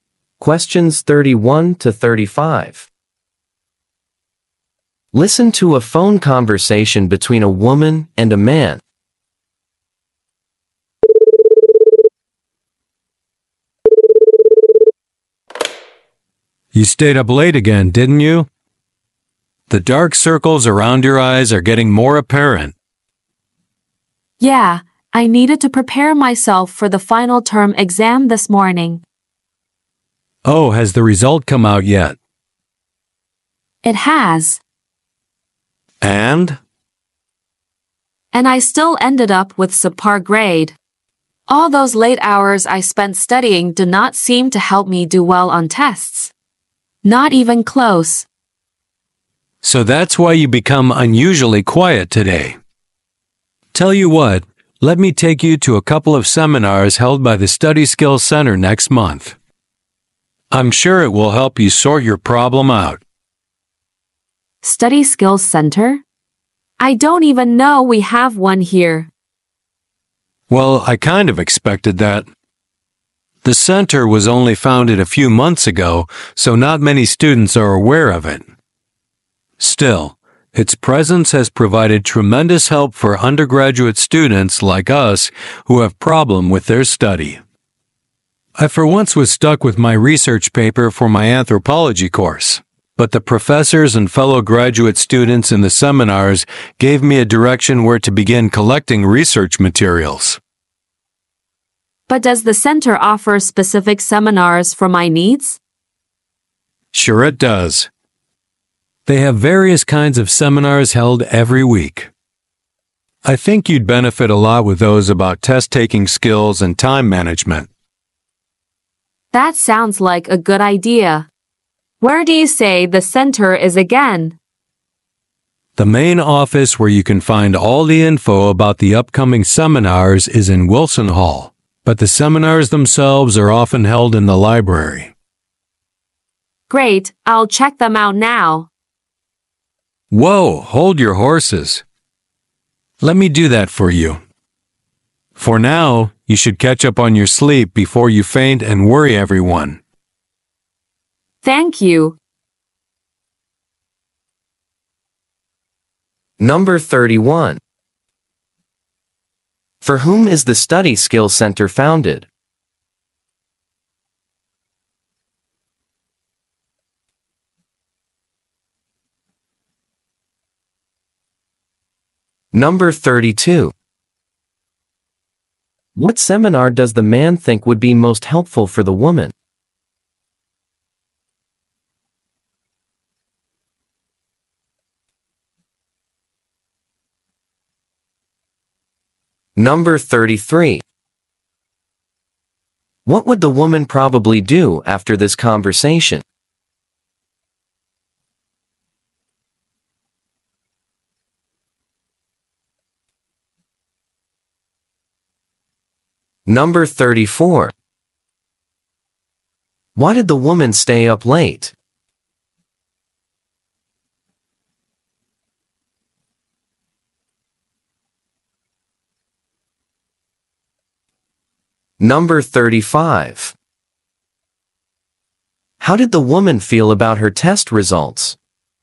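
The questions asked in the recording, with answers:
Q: For whom is the Study Skills Center founded?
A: Undergraduate students who have problems with their study

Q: What seminar does the man think would be most helpful for the woman?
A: Seminars on test-taking skills and time management

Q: What would the woman probably do after this conversation?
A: Catch up on her sleep

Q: Why did the woman stay up late?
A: To prepare for the final term exam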